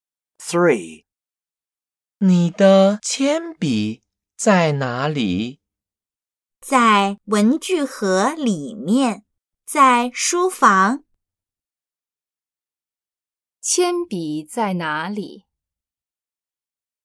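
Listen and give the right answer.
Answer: 在书房的文具盒里面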